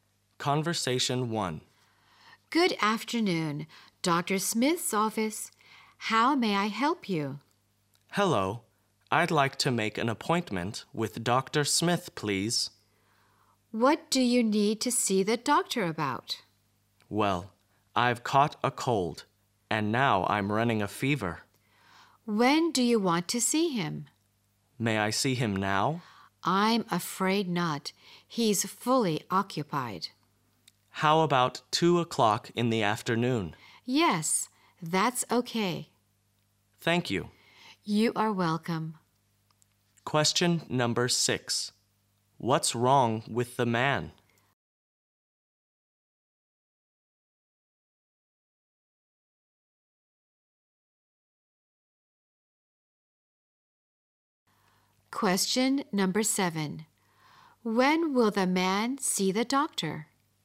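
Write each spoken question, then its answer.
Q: What's wrong with the man?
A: He has caught a cold and is running a fever

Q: When will the man see the doctor?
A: At 2 o'clock in the afternoon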